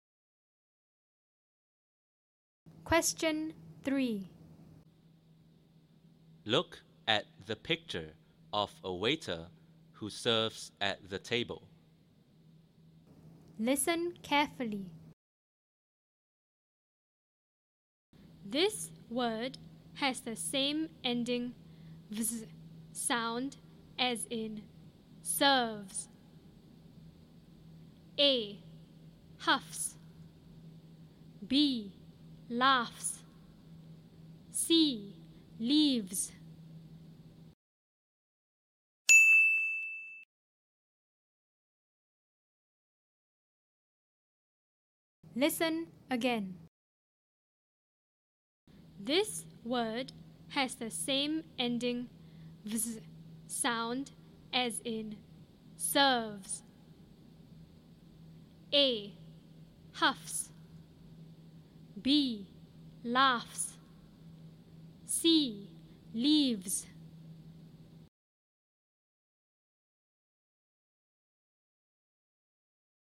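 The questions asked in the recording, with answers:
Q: This word has the same ending "vz" sound as in serves.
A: C: Leaves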